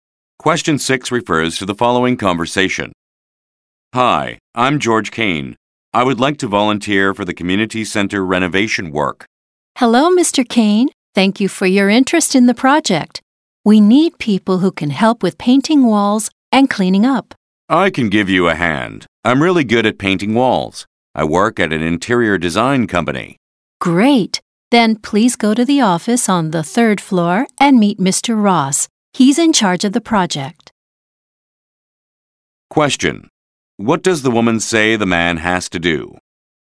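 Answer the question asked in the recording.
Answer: Go to the office on the third floor and meet Mr. Ross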